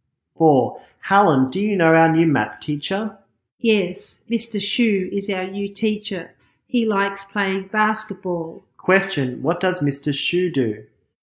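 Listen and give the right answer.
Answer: He is a math teacher.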